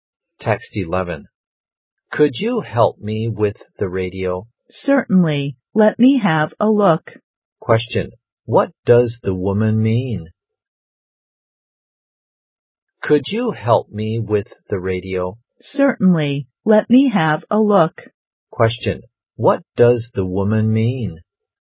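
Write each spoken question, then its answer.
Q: What does the woman mean?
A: She will help him with the radio.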